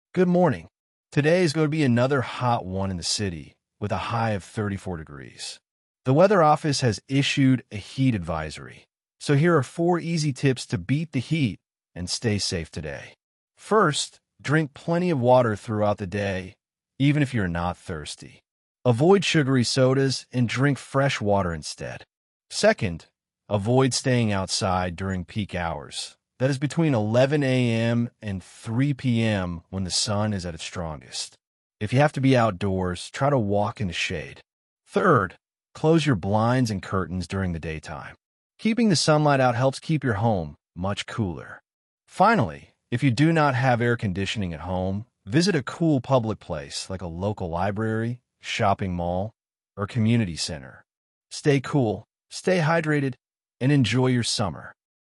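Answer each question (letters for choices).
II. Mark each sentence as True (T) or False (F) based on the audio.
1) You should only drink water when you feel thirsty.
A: F

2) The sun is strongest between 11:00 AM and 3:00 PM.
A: T

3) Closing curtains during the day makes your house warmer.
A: F

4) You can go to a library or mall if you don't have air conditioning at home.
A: T

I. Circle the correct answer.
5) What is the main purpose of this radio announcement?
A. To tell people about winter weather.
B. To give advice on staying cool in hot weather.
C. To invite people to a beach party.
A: B

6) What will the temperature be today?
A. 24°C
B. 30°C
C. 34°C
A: C

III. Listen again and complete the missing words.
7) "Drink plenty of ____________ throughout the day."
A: water

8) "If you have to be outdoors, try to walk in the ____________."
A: shade

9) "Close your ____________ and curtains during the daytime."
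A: blinds

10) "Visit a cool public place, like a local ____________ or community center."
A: library

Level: Low-Intermediate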